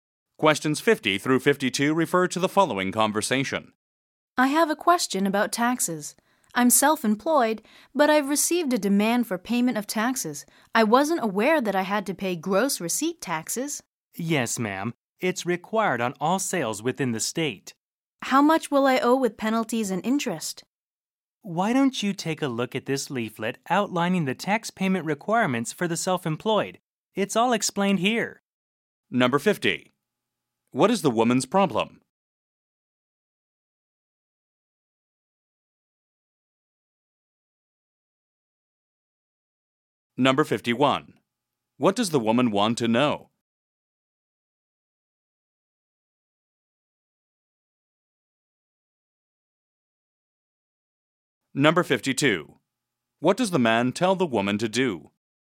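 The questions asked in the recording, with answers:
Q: What is the woman's problem?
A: She got a demand to pay taxes she didn't know she owed

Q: What does the woman want to know?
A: How much she owes with penalties and interest

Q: What does the man tell the woman to do?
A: Read a leaflet on tax payment requirements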